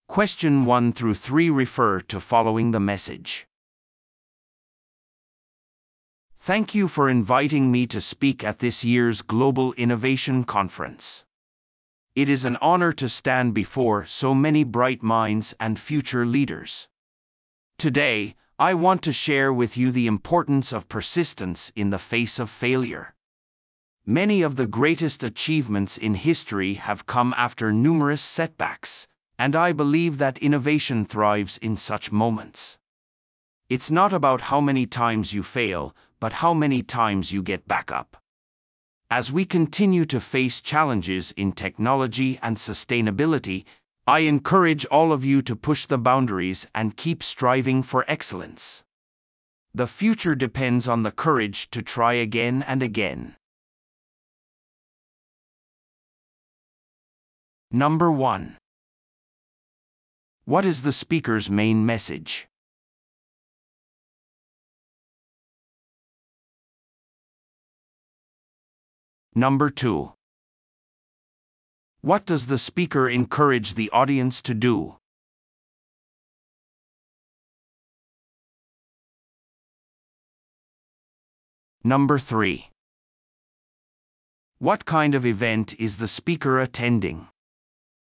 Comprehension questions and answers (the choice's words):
Listen to the audio below and answer the questions.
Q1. What is the speaker's main message?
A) 協力の必要性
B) 忍耐力の重要性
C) 未来におけるテクノロジーの役割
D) 持続可能性の重要性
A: 忍耐力の重要性

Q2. What does the speaker encourage the audience to do?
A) 持続可能性プロジェクトに取り組むこと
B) 失敗を受け入れ、挑戦を続けること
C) 個々の成果に焦点を当てること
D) テクノロジー分野のみで革新すること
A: 失敗を受け入れ、挑戦を続けること

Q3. What kind of event is the speaker attending?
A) ビジネスサミット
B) 持続可能性ワークショップ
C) リーダーシップトレーニング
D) イノベーションカンファレンス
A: イノベーションカンファレンス

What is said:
"Thank you for inviting me to speak at this year's Global Innovation Conference. It is an honor to stand before so many bright minds and future leaders. Today, I want to share with you the importance of persistence in the face of failure. Many of the greatest achievements in history have come after numerous setbacks, and I believe that innovation thrives in such moments. It's not about how many times you fail, but how many times you get back up. As we continue to face challenges in technology and sustainability, I encourage all of you to push the boundaries and keep striving for excellence. The future depends on the courage to try again and again."